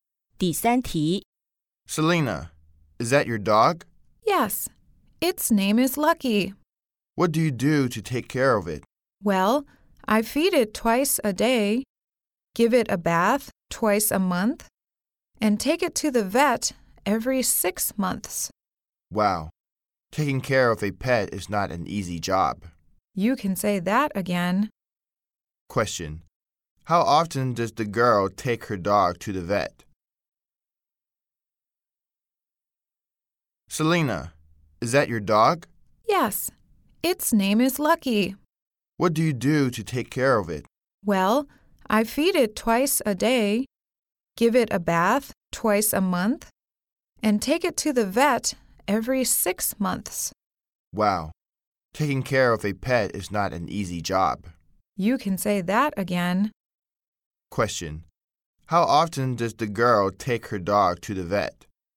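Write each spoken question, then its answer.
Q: How often does the girl take her dog to the vet?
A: Every 6 months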